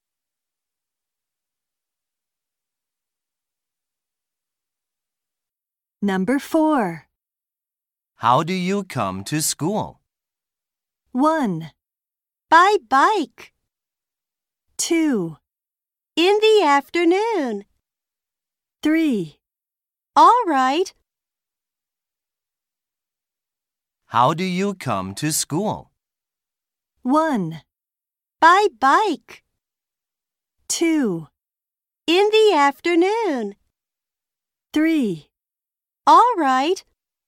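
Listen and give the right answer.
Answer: 1: By bike.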